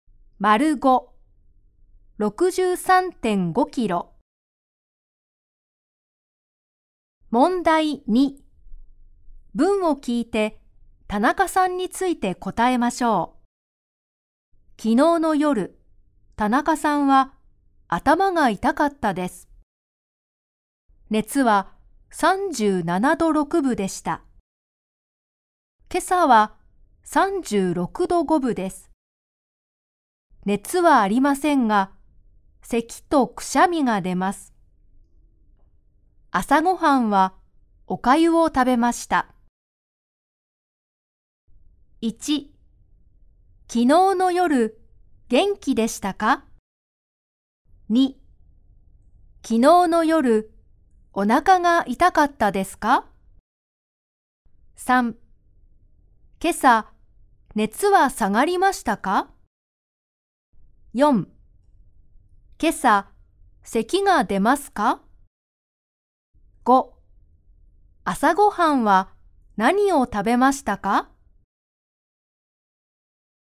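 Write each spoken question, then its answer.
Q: 昨日の夜、元気でしたか?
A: いいえ、頭が痛かったです。

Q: 昨日の夜、お腹が痛かったですか?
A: いいえ、頭が痛かったです。

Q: 今朝、熱は下がりましたか?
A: はい、36度5分です。

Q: 今朝、咳が出ますか?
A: はい、出ます。

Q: 朝ごはんは何を食べましたか?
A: おかゆを食べました。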